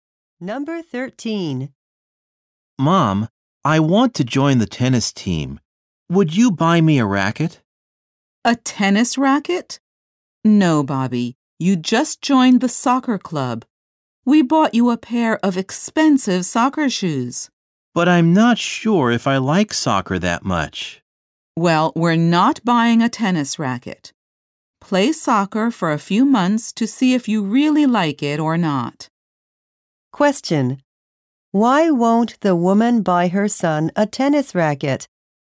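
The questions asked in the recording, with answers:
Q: Why won't the woman buy her son a tennis racket?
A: He just joined the soccer club and they bought him expensive soccer shoes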